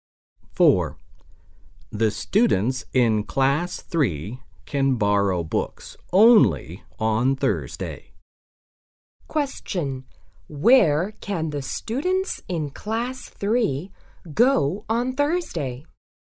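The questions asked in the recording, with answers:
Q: Where can the students in class 3 go on Thursday?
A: The library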